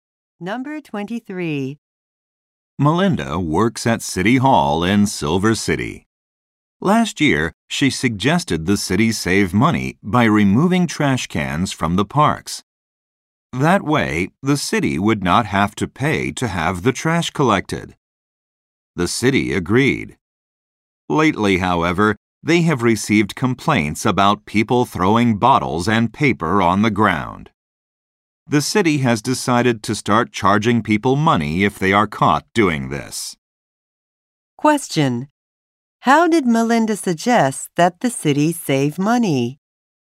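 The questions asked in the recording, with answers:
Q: How did Melinda suggest that the city save money?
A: By removing trash cans from the parks.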